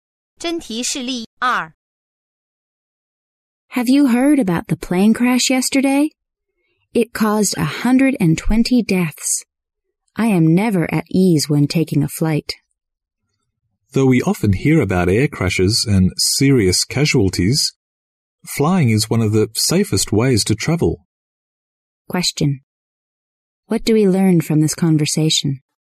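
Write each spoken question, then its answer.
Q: What do we learn from this conversation?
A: Flying is still one of the safest ways to travel, despite the crashes.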